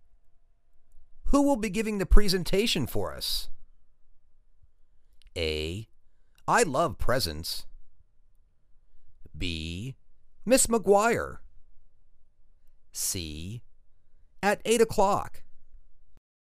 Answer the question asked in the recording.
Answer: Ms. McGuire.